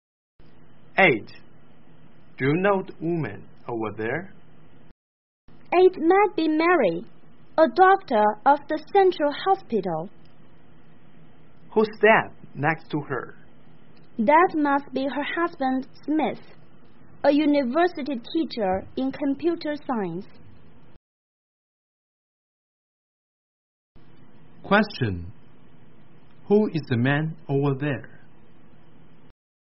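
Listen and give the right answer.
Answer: Mary's husband Smith, a university teacher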